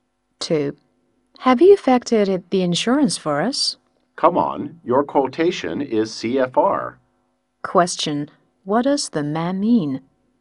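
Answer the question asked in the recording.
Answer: The buyer should arrange the insurance, since the price is CFR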